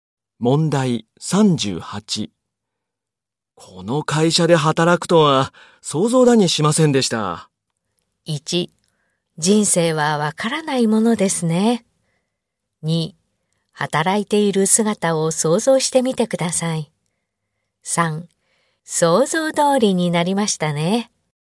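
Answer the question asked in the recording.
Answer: 1: 人生はわからないものですね。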